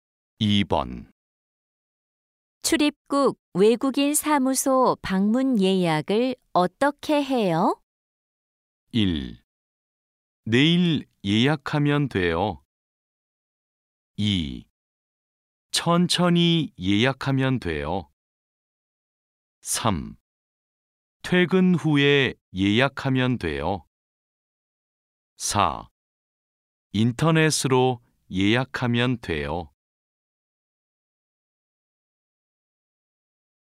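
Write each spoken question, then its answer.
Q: 출입국 외국인 사무소 방문 예약을 어떻게 해요?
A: 4: 인터넷으로 예약하면 돼요.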